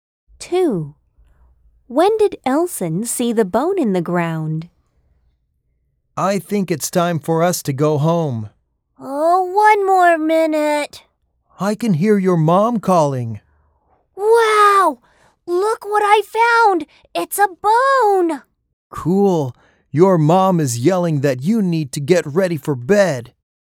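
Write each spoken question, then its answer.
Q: When did Elson see the bone in the ground?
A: At bedtime, in the evening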